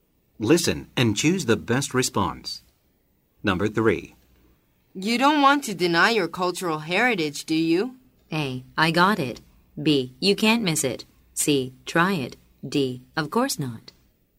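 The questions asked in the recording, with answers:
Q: You don't want to deny your cultural heritage, do you?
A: D: Of course not.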